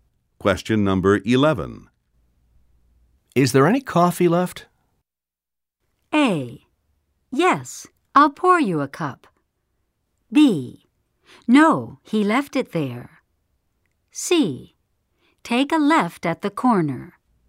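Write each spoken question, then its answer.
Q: Is there any coffee left?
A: A: Yes, I'll pour you a cup.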